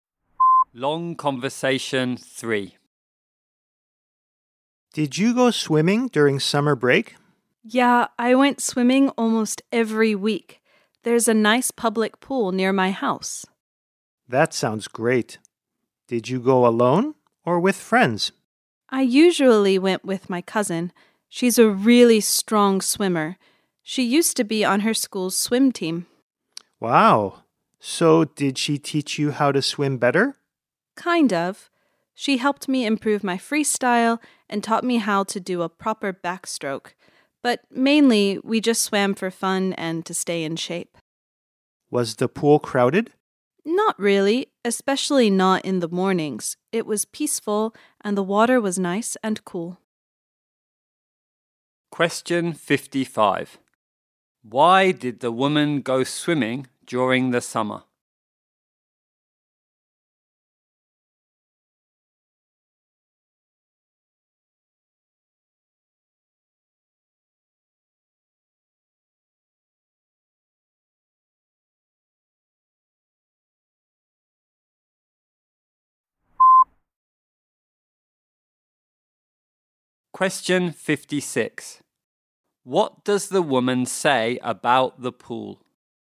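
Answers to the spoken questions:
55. Mainly for fun and to stay in shape
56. It was not very crowded, especially in the mornings; peaceful with nice, cool water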